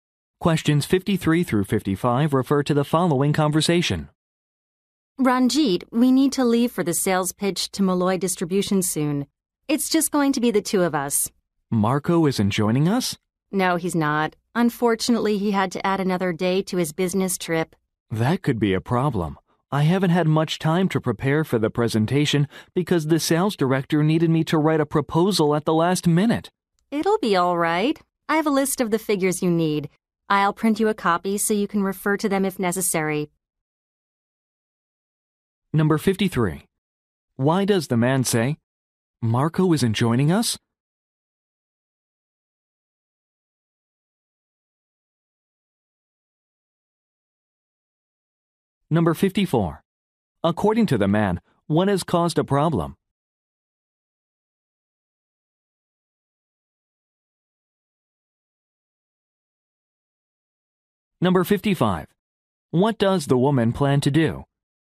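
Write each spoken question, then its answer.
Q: According to the man, what has caused a problem?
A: He had to write a proposal at the last minute, so he had little time to prepare

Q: What does the woman plan to do?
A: Print him a copy of the list of figures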